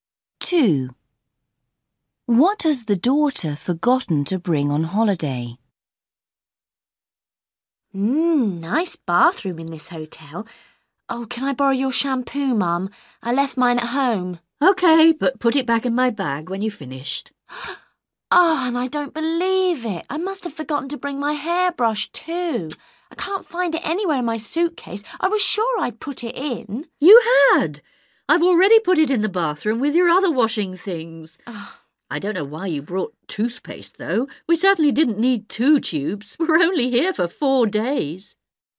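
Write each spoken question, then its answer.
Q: What has the daughter forgotten to bring on holiday?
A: Shampoo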